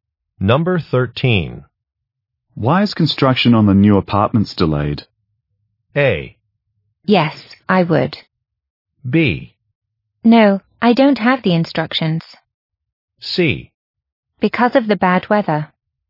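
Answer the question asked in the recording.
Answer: C: Because of the bad weather.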